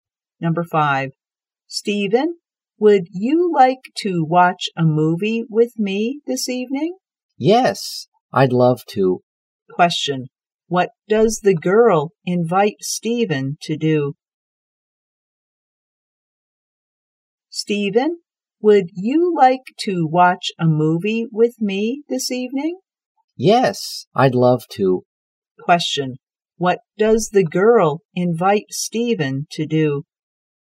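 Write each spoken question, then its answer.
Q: What does the girl invite Stephen to do?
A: To watch a movie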